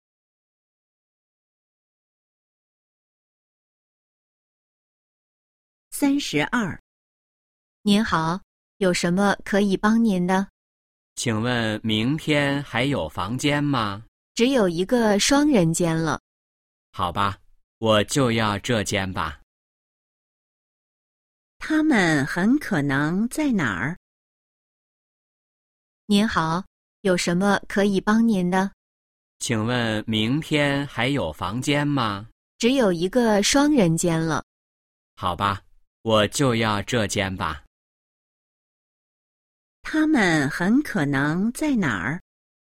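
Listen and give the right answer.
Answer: 宾馆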